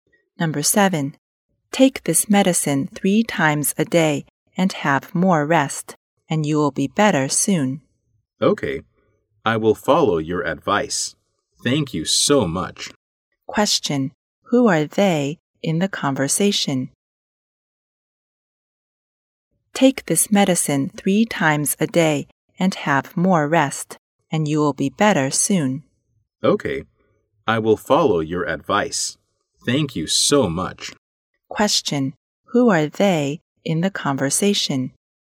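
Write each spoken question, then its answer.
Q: Who are they?In the conversation.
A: A doctor and a patient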